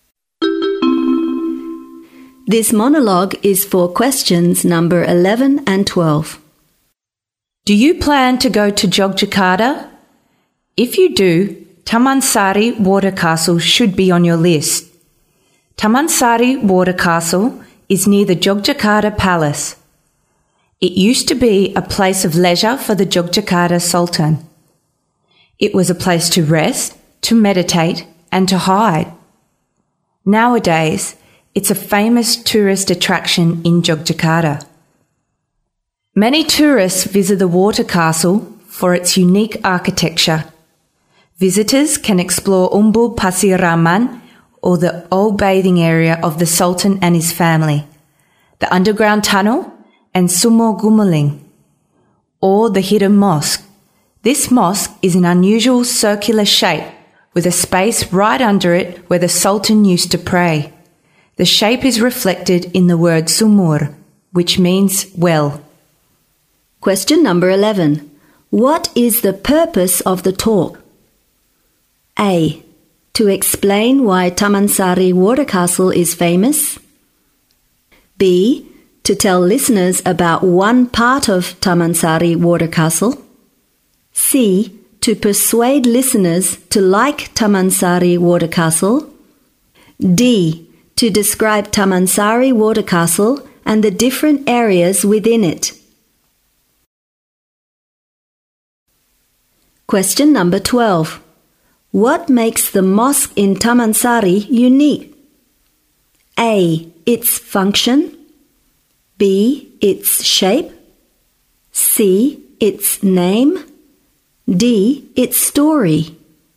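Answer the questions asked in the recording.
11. D: To describe Tamansari Water Castle and the different areas within it.
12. B: Its shape.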